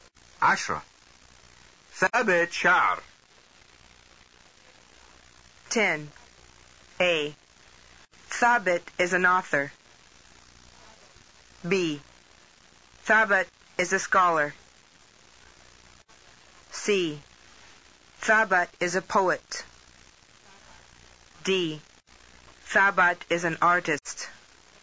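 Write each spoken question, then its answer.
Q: عشرة. ثابت شعر.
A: C: ثابت is a poet.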